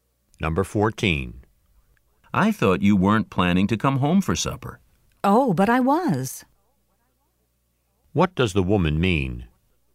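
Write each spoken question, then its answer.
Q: What does the woman mean?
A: She did plan to come home for supper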